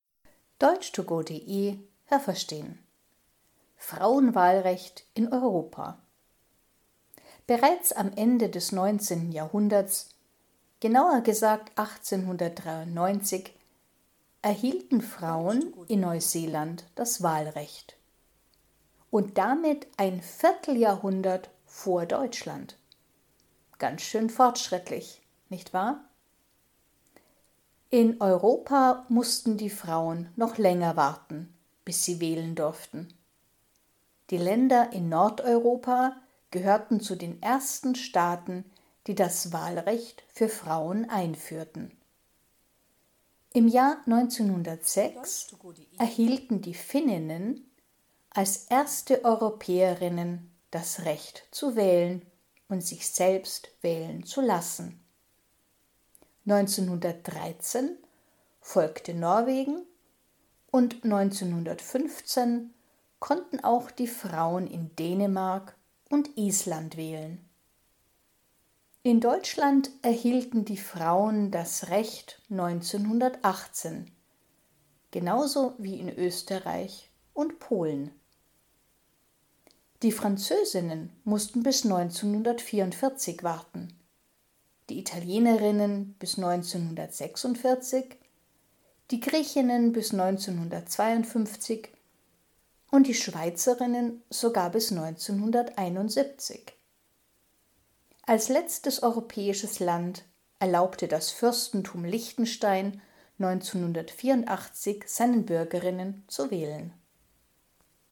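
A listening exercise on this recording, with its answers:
Welche Präposition passt?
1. Neuseeländerinnen konnten bereits _____ Ende des 19. Jahrhunderts wählen.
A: am

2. In Neuseeland konnten die Frauen schon 1893 wählen, also lange _____ den deutschen Frauen.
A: vor

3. Die Länder in Nordeuropa gehörten _____ den ersten Staaten, in denen die Frauen wählen konnten.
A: zu

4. _____ Jahr 1906 erhielten die Finninnen als erste Europäerinnen das Wahlrecht.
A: Im

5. Die Schweizerinnen mussten _____ 1971 warten.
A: bis

Was haben Sie gehört? Es gibt nur eine korrekte Antwort.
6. 1893 konnten _____ bereits wählen.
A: Frauen in Neuseeland

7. In Europa konnten zuerst die Frauen in _____ wählen.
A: Nordeuropa

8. Die Frauen in _____ konnten als erste in Europa wählen.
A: Finnland

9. Die Finninnen konnten bereits _____ wählen.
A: 1906

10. 1918 erhielten die Frauen in _____ das Wahlrecht.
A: Deutschland, Österreich und Polen

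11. Im Fürstentum Liechtenstein durften die Frauen erst _____ wählen.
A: 1984

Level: A (einfach)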